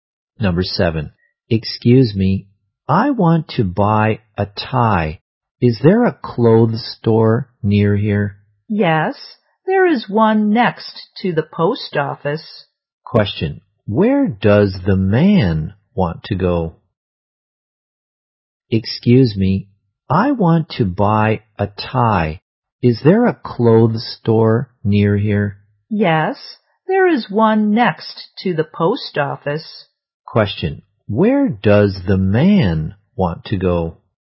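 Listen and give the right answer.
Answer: To a clothes store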